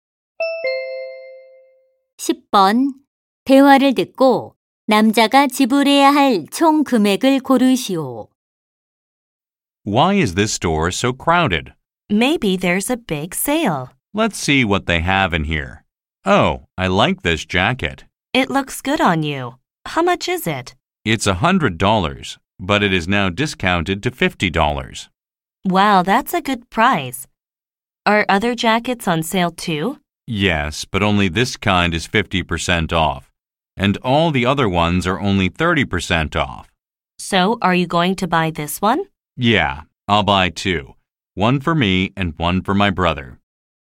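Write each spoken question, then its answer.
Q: 대화를 듣고 남자가 지불해야 할 총 금액을 고르시오.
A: 100달러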